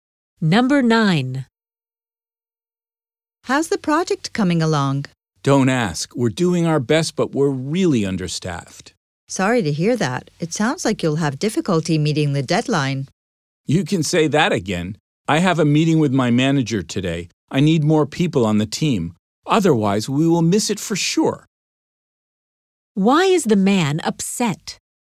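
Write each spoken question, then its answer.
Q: Why is the man upset?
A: His team is understaffed and may miss the deadline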